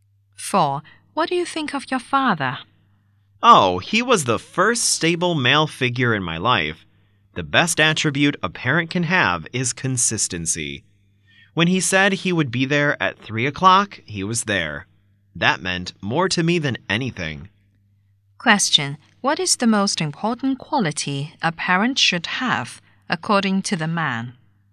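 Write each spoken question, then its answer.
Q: What is the most important quality a parent should have, according to the man?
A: Consistency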